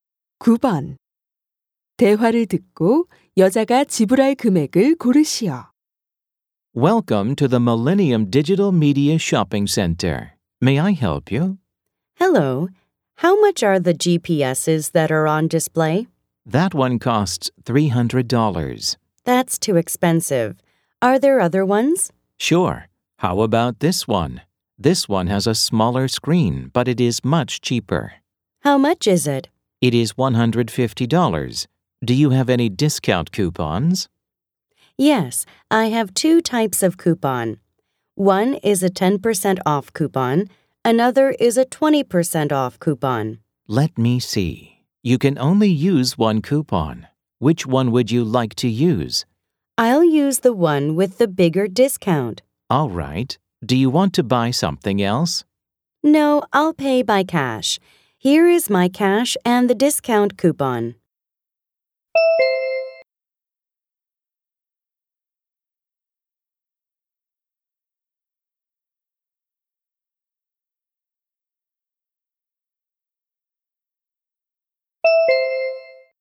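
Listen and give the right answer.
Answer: 120달러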